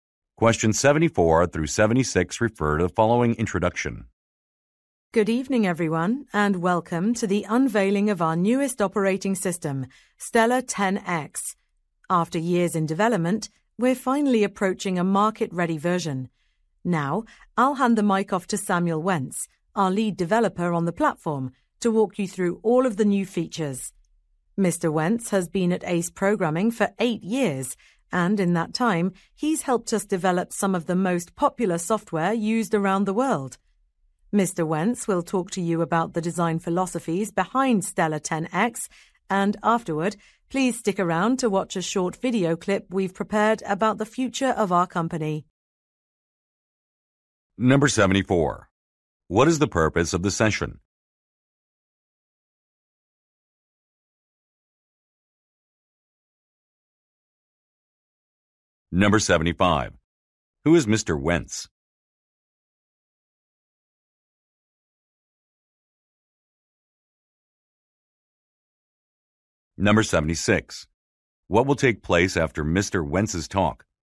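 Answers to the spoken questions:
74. To unveil a new operating system
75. The lead developer
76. A short video will be shown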